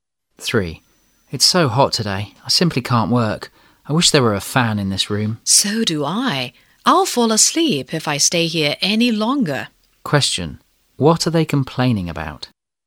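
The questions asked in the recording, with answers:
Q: What are they complaining about?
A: The heat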